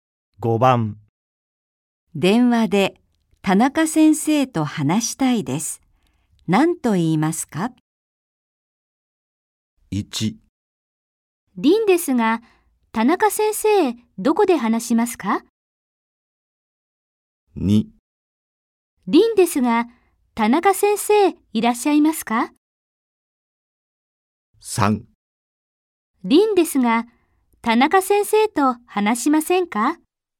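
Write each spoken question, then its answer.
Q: 電話で田中先生と話したいです。何と言いますか?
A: 2: 凛ですが、田中先生、いらっしゃいますか?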